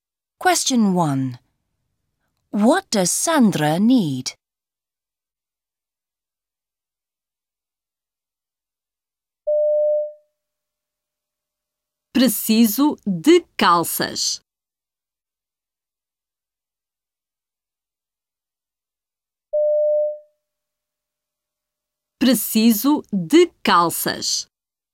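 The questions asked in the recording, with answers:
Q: What does Sandra need?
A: Trousers (calças)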